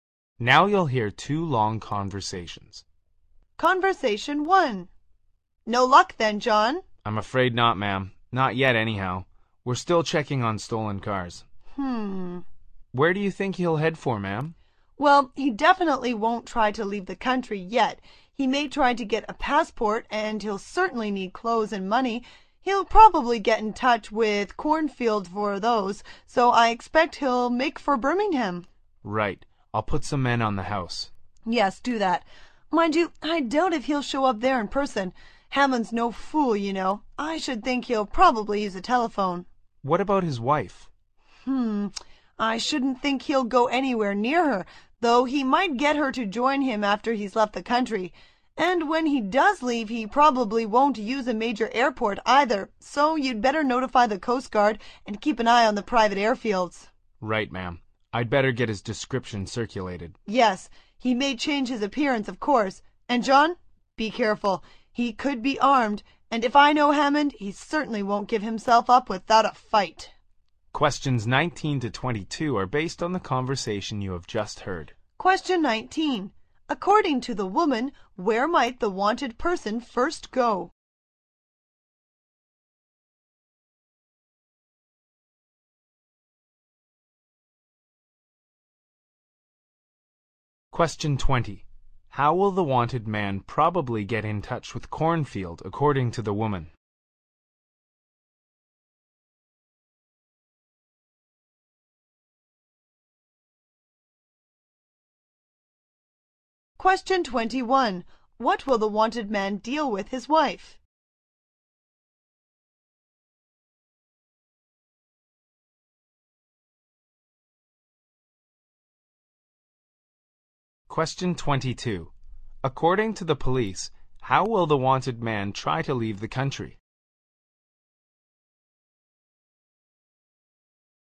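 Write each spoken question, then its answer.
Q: According to the woman, where might the wanted person first go?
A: Birmingham

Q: How will the wanted man probably get in touch with Cornfield, according to the woman?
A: By telephone

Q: What will the wanted man deal with his wife?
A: He might get her to join him after he has left the country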